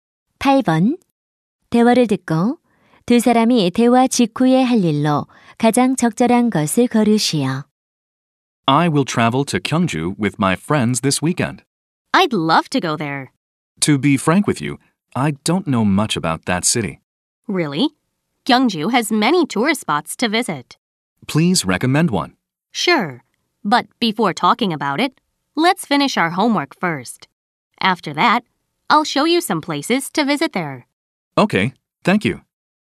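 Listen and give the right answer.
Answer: 숙제 끝내기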